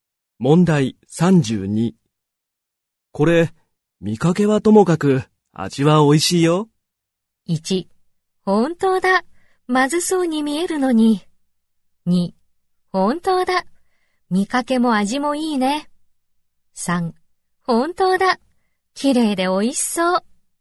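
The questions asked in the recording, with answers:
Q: これ、見かけはともかく、味は美味しいよ。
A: 1: 本当だ、まずそうに見えるのに。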